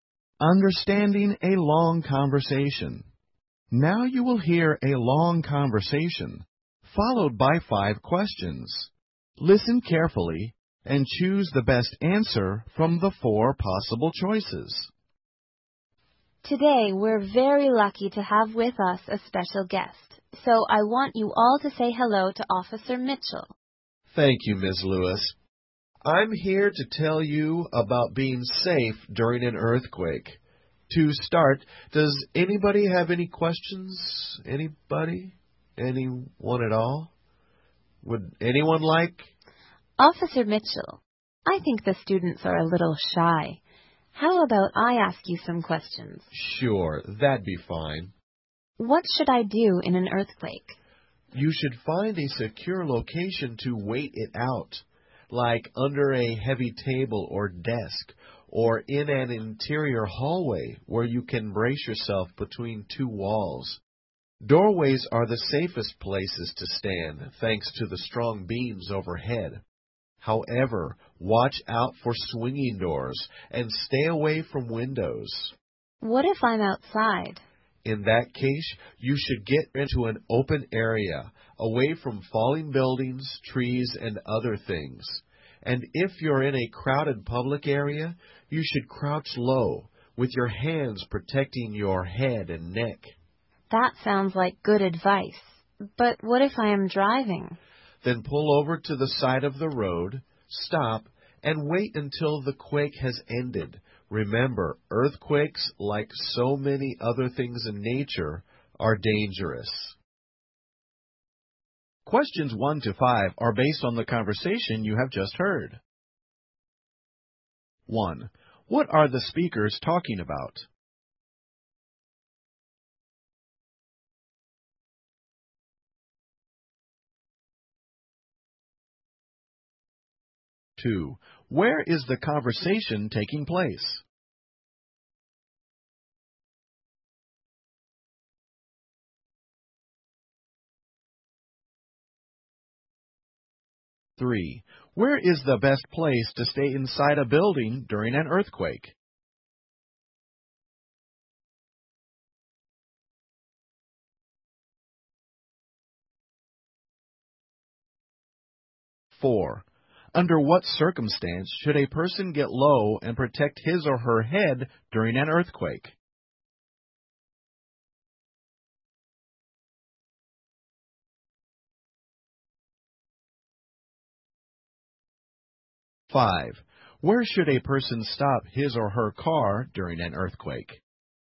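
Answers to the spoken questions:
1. Staying safe during an earthquake
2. In a classroom
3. In a doorway
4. When in a crowded public area
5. At the side of the road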